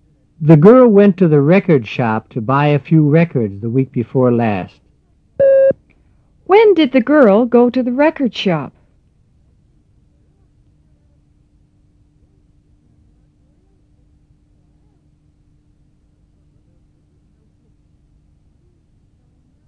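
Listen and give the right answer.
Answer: The week before last.

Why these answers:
The girl went to the record shop to buy a few records the week before last.

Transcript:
The girl went to the record shop to buy a few records the week before last. When did the girl go to the record shop?

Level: 入门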